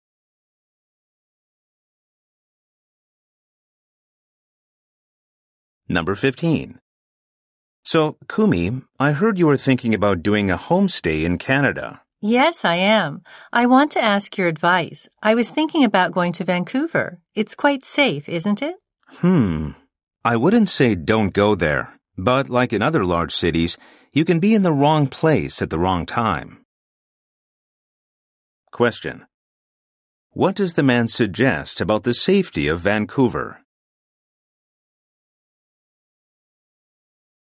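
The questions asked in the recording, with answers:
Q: What does the man suggest about the safety of Vancouver?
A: Like other large cities, it can be dangerous in the wrong place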